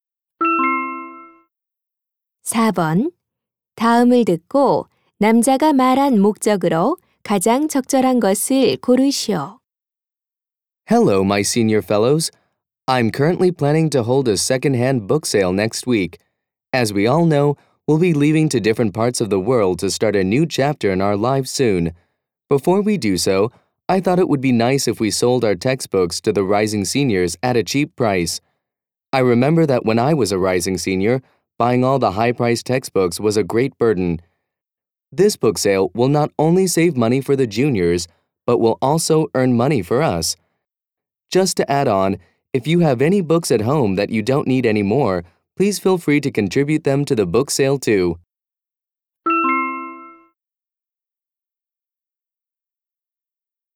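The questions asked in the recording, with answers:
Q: 다음을 듣고 남자가 말한 목적으로 가장 적절한 것을 고르시오.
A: 중고 교과서 판매 행사를 알리고 참여를 권하려고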